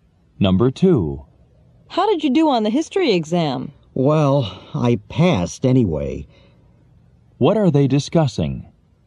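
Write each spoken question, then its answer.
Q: What are they discussing?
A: The history exam results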